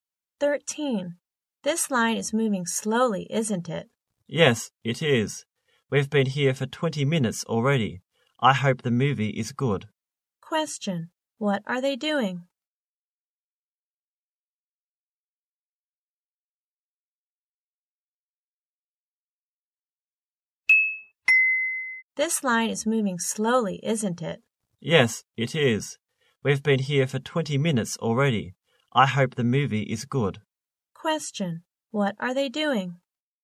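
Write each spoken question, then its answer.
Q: What are they doing?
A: Waiting in line for a movie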